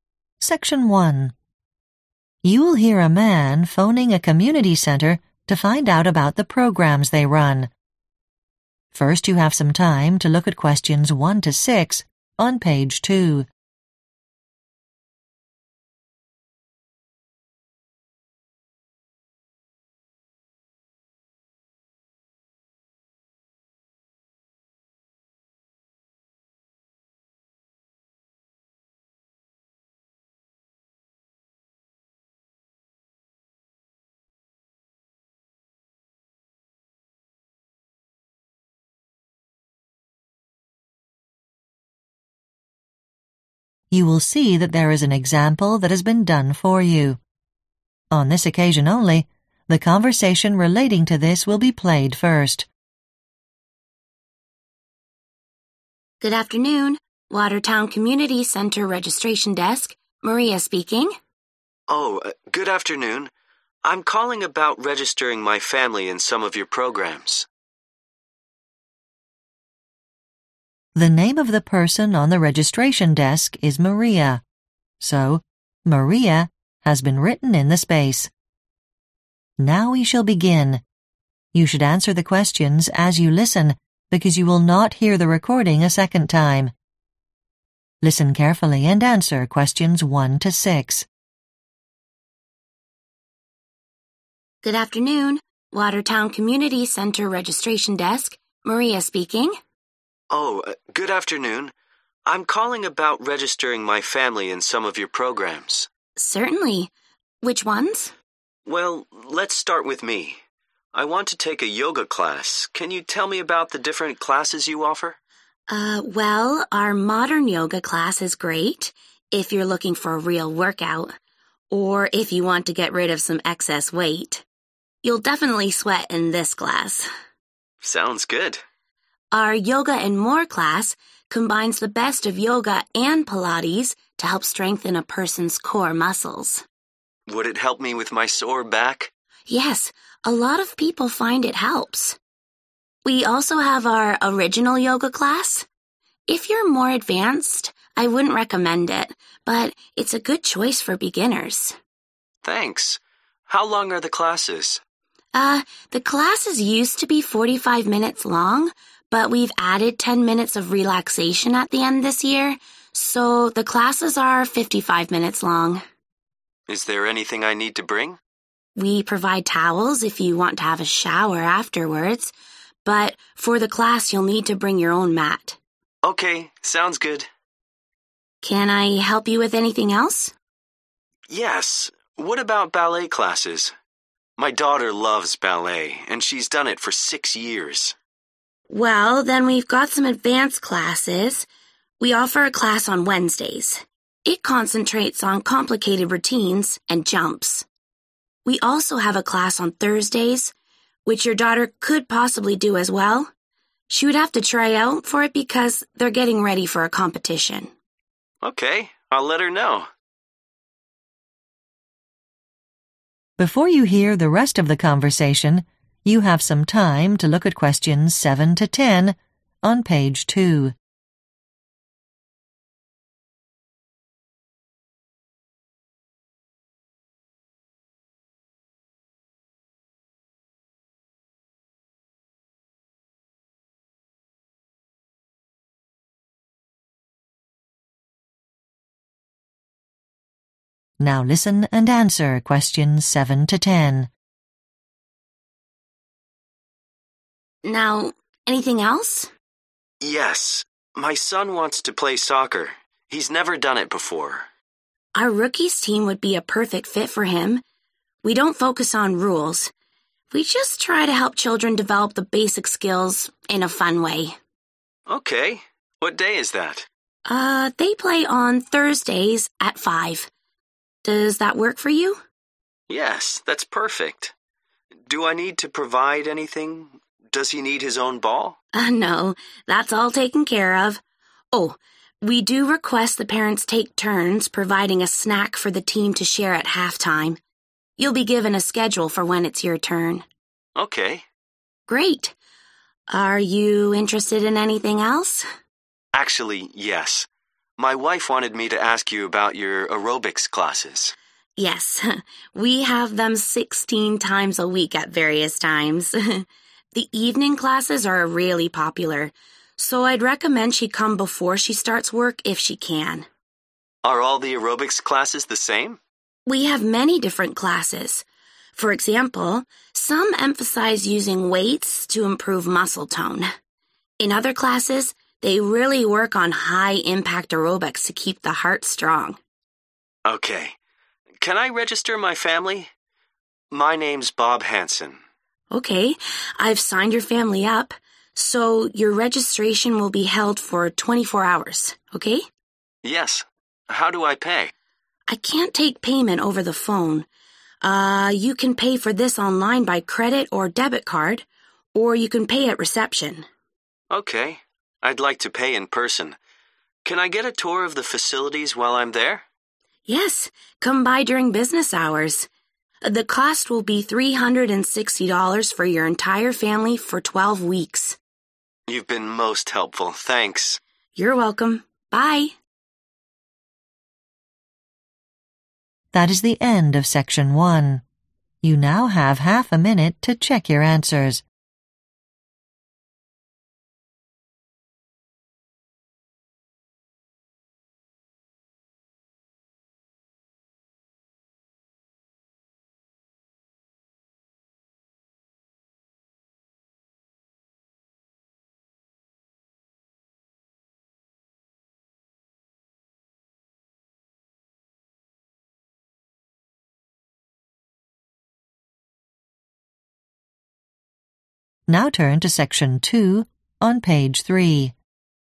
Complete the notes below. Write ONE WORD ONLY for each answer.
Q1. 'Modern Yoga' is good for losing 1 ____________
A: weight

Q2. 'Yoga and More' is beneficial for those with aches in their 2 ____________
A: back

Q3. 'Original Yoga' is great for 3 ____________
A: beginners

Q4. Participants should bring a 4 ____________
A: mat

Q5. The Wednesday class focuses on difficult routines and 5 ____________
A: jumps

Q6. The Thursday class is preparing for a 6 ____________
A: competition

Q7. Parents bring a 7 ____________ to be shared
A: snack

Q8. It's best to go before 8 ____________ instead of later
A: work

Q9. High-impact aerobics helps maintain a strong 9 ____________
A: heart

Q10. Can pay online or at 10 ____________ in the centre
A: reception